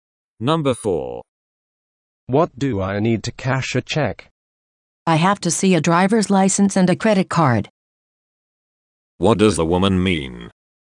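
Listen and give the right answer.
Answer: He needs a driver's license and a credit card to cash a check.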